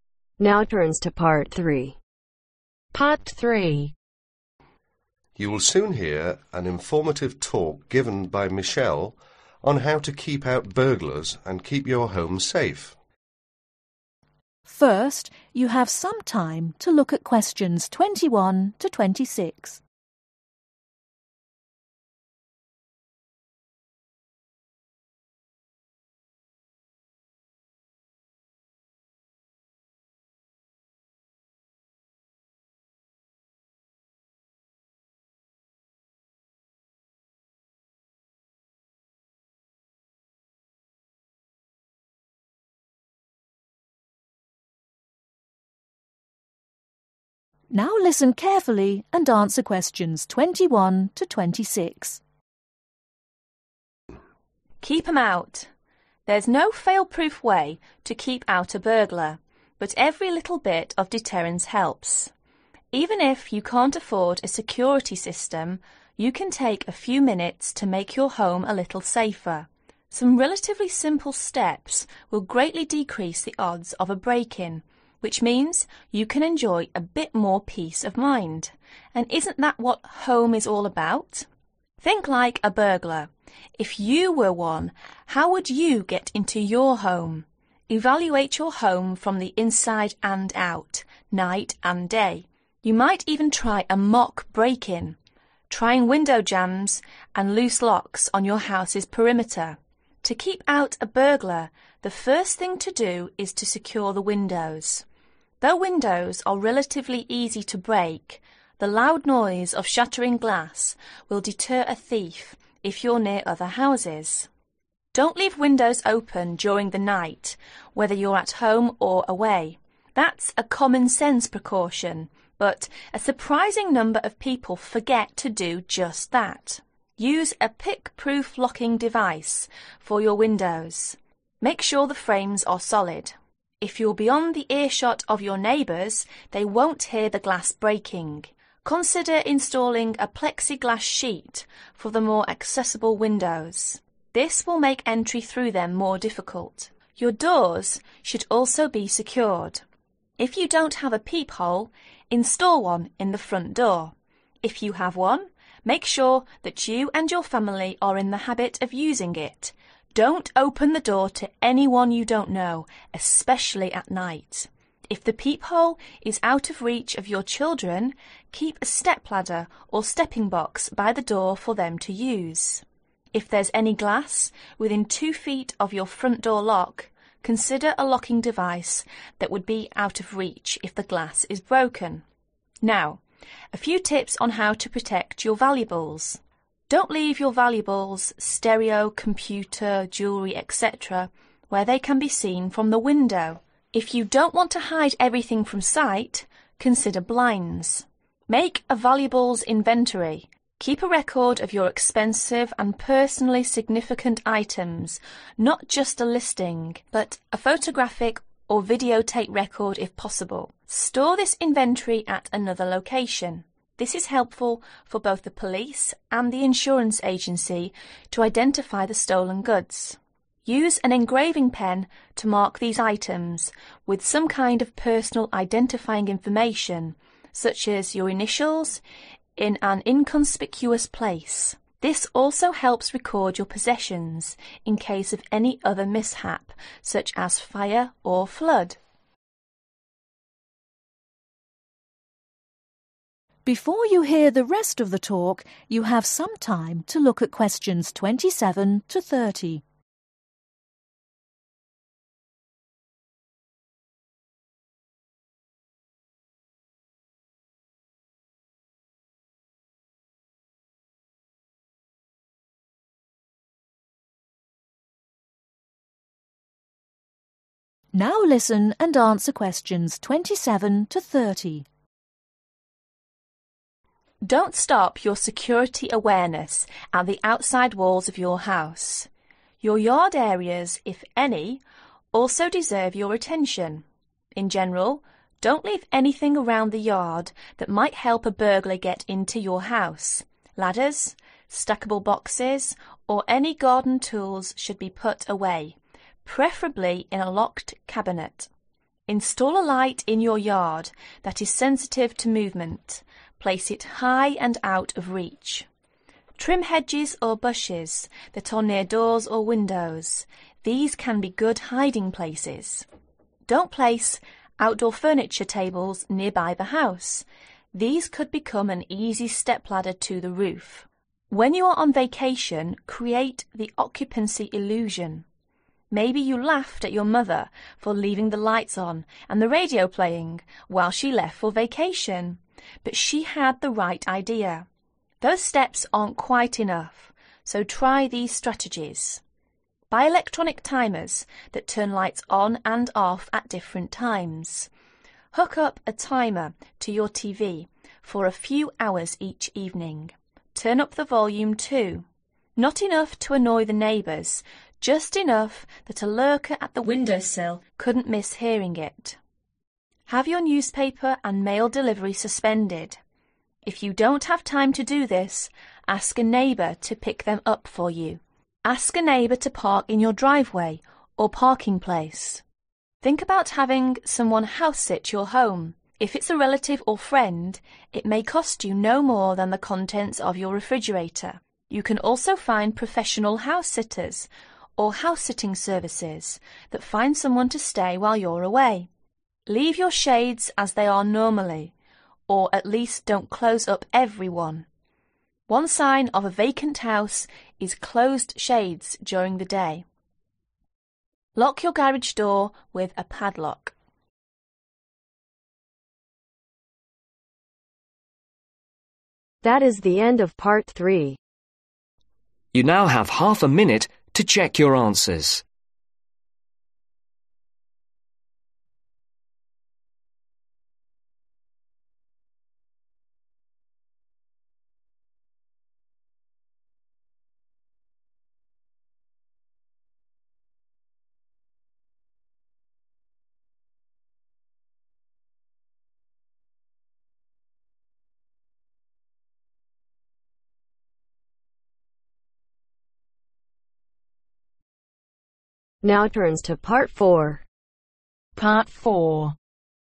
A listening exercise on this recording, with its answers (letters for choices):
Write NO MORE THAN TWO WORDS for each answer.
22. Use a pick proof (22) ............ for your windows.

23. Install a (23) ............ in the front door.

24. open the door to anyone you (24) ............ .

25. Leave them where they can be seen from the (25) ............. .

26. Make a valuables (26) ............ .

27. To ensure safety in your courtyard, you should install a light.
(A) near the door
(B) near each of your windows.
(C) somewhere high out of reach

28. Why is there a need to trim hedges or bushes in your courtyard ?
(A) Because they may be used by burglars as good hiding places.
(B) Because they do not help in creating an occupancy illusion.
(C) Because they may block the views from the windows and peepholes.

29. - Have your mail delivery and newspaper (29) ............ .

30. - Lock your (30) ............ with a padlock.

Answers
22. locking device
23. peephole
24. don't know
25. window
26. inventory
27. C
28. A
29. suspended
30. garage door